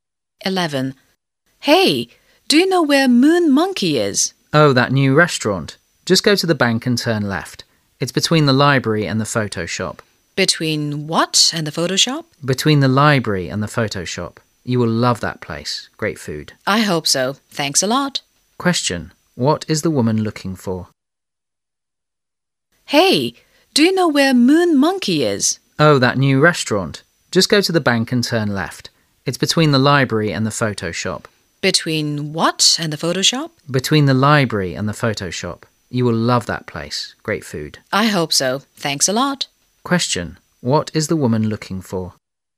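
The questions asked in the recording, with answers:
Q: What is the woman looking for?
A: A restaurant called Moon Monkey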